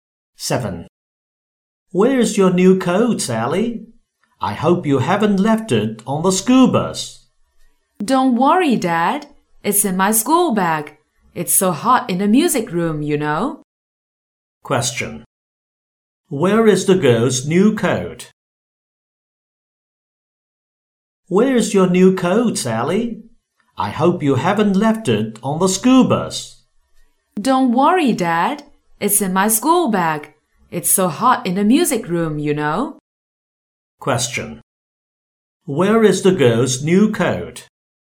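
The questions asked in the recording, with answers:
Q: Where is the girl's new coat?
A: In her school bag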